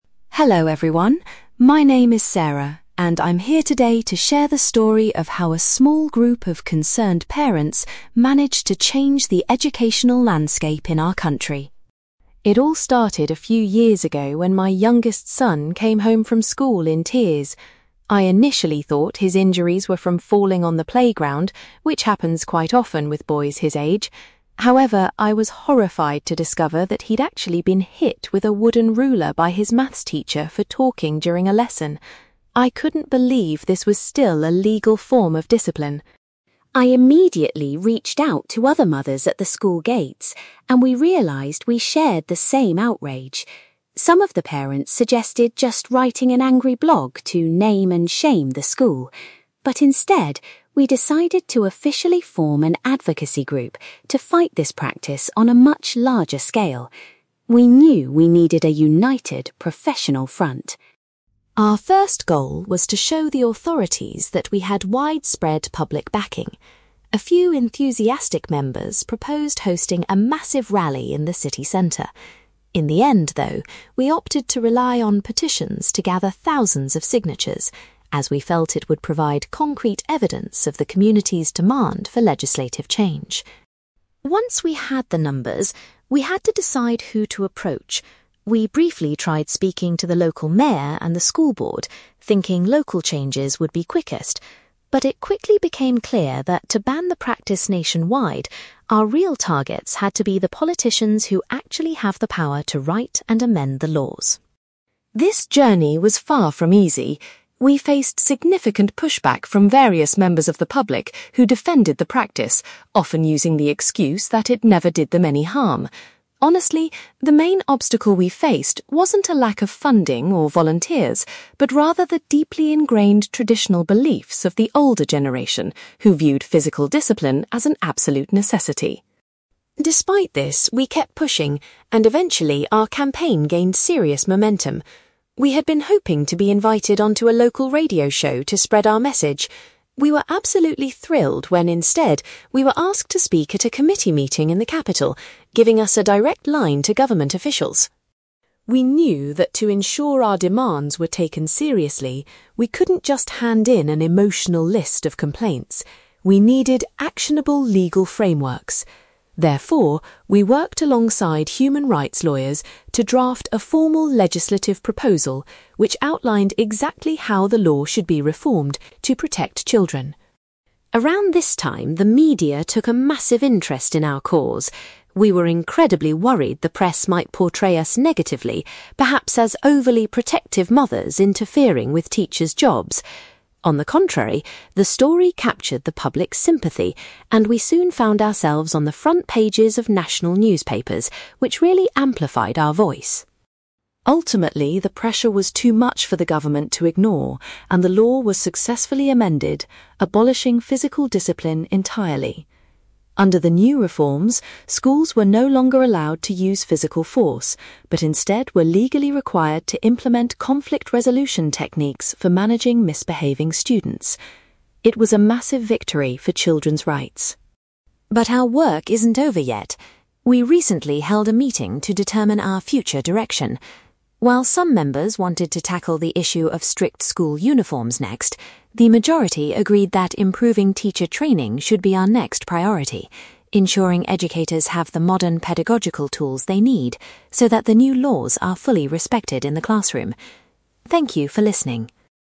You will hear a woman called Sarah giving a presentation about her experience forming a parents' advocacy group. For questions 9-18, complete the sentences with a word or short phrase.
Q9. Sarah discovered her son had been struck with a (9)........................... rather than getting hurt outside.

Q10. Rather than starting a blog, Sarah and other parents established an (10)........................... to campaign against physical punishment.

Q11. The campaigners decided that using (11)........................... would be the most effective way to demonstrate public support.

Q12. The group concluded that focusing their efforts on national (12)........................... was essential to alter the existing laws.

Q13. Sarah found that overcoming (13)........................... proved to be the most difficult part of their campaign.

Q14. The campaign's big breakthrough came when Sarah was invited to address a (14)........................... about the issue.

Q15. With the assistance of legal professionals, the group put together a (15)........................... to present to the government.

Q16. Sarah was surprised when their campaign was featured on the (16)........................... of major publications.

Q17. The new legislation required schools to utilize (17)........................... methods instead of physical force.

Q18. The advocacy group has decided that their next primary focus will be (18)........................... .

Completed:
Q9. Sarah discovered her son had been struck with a wooden ruler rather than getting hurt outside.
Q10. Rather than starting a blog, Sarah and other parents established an advocacy group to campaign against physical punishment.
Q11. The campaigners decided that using petitions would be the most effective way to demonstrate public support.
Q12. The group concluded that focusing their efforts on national politicians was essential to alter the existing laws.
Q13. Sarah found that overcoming traditional beliefs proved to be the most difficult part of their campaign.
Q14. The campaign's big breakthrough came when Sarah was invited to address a committee meeting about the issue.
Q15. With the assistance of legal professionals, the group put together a legislative proposal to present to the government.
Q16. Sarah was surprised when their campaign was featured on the front pages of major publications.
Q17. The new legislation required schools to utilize conflict resolution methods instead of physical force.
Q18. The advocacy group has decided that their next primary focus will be teacher training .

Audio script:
Sarah: Hello everyone. My name is Sarah, and I'm here today to share the story of how a small group of concerned parents managed to change the educational landscape in our country.
It all started a few years ago when my youngest son came home from school in tears. I initially thought his injuries were from falling on the playground, which happens quite often with boys his age. However, I was horrified to discover that he'd actually been hit with a wooden ruler by his maths teacher for talking during a lesson. I couldn't believe this was still a legal form of discipline.
I immediately reached out to other mothers at the school gates, and we realised we shared the same outrage. Some of the parents suggested just writing an angry blog to name and shame the school. But instead, we decided to officially form an advocacy group to fight this practice on a much larger scale. We knew we needed a united, professional front.
Our first goal was to show the authorities that we had widespread public backing. A few enthusiastic members proposed hosting a massive rally in the city centre. In the end, though, we opted to rely on petitions to gather thousands of signatures, as we felt it would provide concrete evidence of the community's demand for legislative change.
Once we had the numbers, we had to decide who to approach. We briefly tried speaking to the local mayor and the school board, thinking local changes would be quickest. But it quickly became clear that to ban the practice nationwide, our real targets had to be the politicians who actually have the power to write and amend the laws.
This journey was far from easy. We faced significant pushback from various members of the public who defended the practice, often using the excuse that it never did them any harm. Honestly, the main obstacle we faced wasn't a lack of funding or volunteers, but rather the deeply ingrained traditional beliefs of the older generation who viewed physical discipline as an absolute necessity.
Despite this, we kept pushing, and eventually, our campaign gained serious momentum. We had been hoping to be invited onto a local radio show to spread our message. We were absolutely thrilled when, instead, we were asked to speak at a committee meeting in the capital, giving us a direct line to government officials.
We knew that to ensure our demands were taken seriously, we couldn't just hand in an emotional list of complaints. We needed actionable legal frameworks. Therefore, we worked alongside human rights lawyers to draft a formal legislative proposal which outlined exactly how the law should be reformed to protect children.
Around this time, the media took a massive interest in our cause. We were incredibly worried the press might portray us negatively, perhaps as overly protective mothers interfering with teachers' jobs. On the contrary, the story captured the public's sympathy, and we soon found ourselves on the front pages of national newspapers, which really amplified our voice.
Ultimately, the pressure was too much for the government to ignore, and the law was successfully amended, abolishing physical discipline entirely. Under the new reforms, schools were no longer allowed to use physical force, but instead were legally required to implement conflict resolution techniques for managing misbehaving students. It was a massive victory for children's rights.
But our work isn't over yet. We recently held a meeting to determine our future direction. While some members wanted to tackle the issue of strict school uniforms next, the majority agreed that improving teacher training should be our next priority, ensuring educators have the modern pedagogical tools they need so that the new laws are fully respected in the classroom. Thank you for listening.

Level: B2